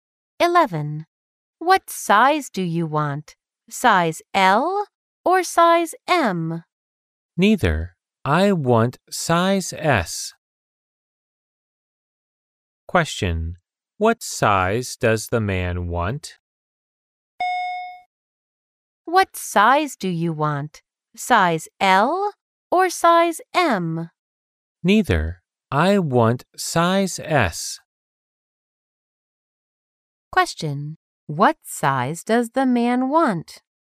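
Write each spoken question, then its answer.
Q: What size does the man want?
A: Size S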